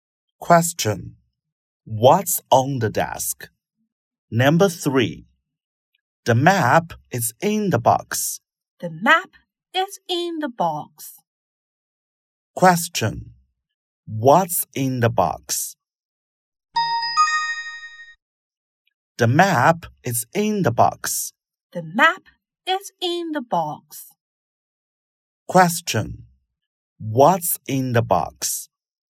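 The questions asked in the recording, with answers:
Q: What's in the box?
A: The map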